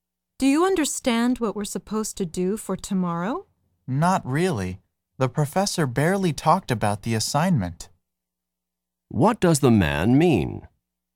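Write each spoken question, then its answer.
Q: What does the man mean?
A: He doesn't really understand the assignment because the professor barely explained it.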